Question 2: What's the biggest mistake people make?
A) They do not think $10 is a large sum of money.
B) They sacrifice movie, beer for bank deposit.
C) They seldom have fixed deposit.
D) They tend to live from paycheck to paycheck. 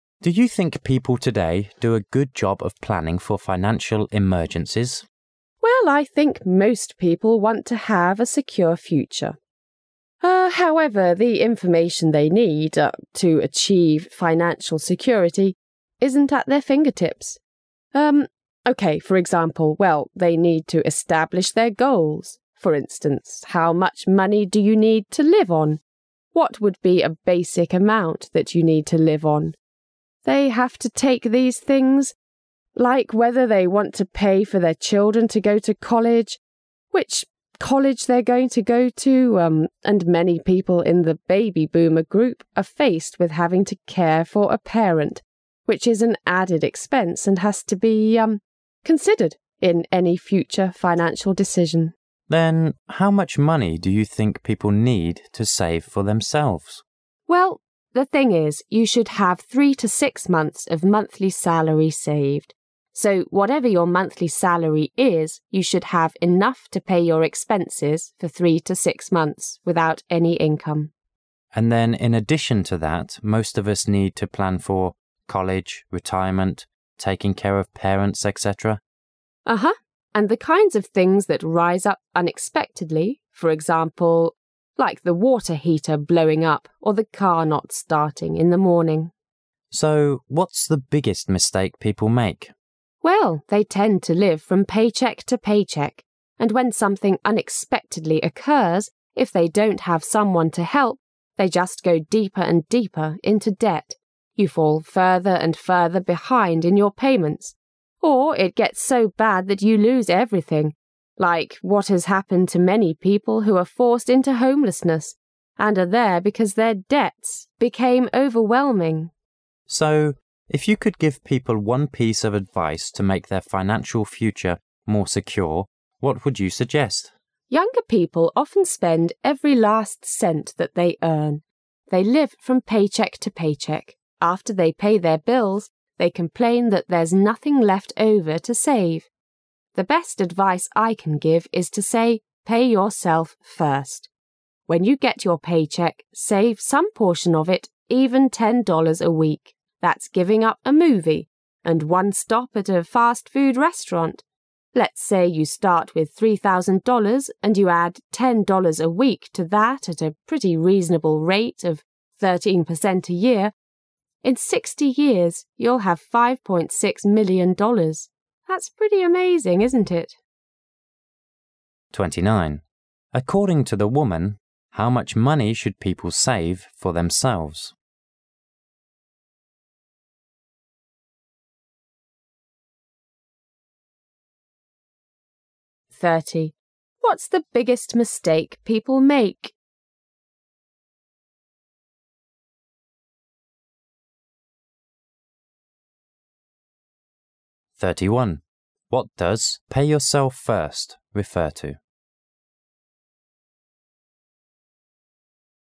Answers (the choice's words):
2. They tend to live from paycheck to paycheck.

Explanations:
问题是人们花钱时最大的错误是什么,女的回答"they tend to live from paycheck to pay check",这个信息在上下文里出现多次,可以明确答案是D。

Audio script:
[解析] 29-31 M: Do you think people today do a good job of planning for financial emergencies? W: Well, I think most people want to have a secure future. Um, however, the information th. ey need, urn, to achieve financial security isn't at their fingertips. Um, OK, for example, well, they need to establish their goals, for instance, how much money do you need to live on, what would be a basic amount that you need to live on? They have to take these things like whether they want to pay for their children to go to college, which college they're going to go to, um, and many people in the baby boomer group are faced with having to care for a parent, which is an added expense and has to be, urn, considered in any future financial decision. M: Then how much money do you think people need to save for themselves? W: Well, the thing is, you should have 3--6 months of monthly salary saved, so whatever your monthly salary is you should have enough to pay your expenses for 3—6 months without any income. M: And then in addition to that, most of us need to plan for college, retirement, taking care of parents, etc. And the kinds of things that rise up unexpectedly, for example, like the water heater blowing up or the car not starting in the morning. M: So, what's the biggest mistake people make? W: Well, they tend to live from paycheck to paycheck. And when something unexpectedly occurs, if they don't have someone to help, they just go deeper and deeper into debt, you fall further and further behind in your payments. Or, it gets so bad that you lose everything, like what has happened to many people who are forced into homelessness and are there because their debts became overwhelming. M: So, if you could give people one piece of advice to make their financial future more secure, what would you suggest? W: Younger people often spend every last cent that they earn. After they pay their bills, they complain that there's nothing left over to save. The best advice I can give is to say "Pay yourself first. ' When you get your paycheck, save some portion of it, even $10 a week. That's giving up a movie, and one stop at a fast food restaurant. Let's say you start with $ 3000, and you add $10 a week to that at a pretty reasonable rate of 13% a year. In 60 years you'll have 5.6 million dollars. That's pretty amazing, isn't it? According to the woman, how much money should people save for themselves?